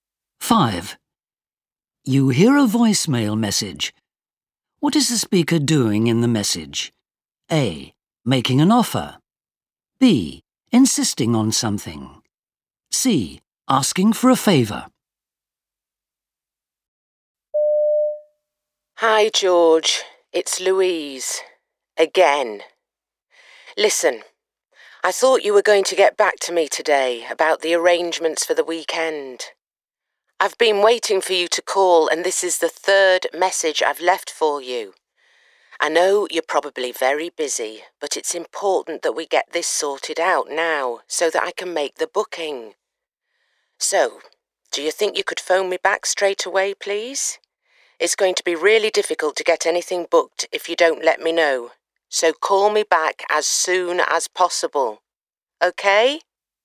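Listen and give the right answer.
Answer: B: Insisting on something.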